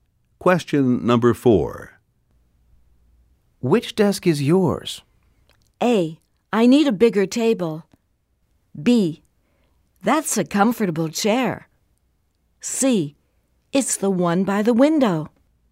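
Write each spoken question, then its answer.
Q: Which desk is yours?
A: C: It's the one by the window.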